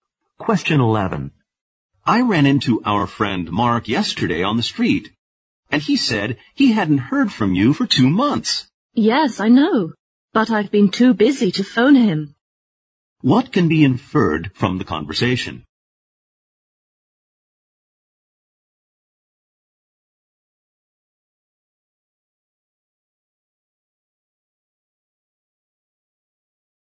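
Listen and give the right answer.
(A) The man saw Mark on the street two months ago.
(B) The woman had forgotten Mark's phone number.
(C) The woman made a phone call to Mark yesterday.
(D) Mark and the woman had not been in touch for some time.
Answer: (D) Mark and the woman had not been in touch for some time.

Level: 四级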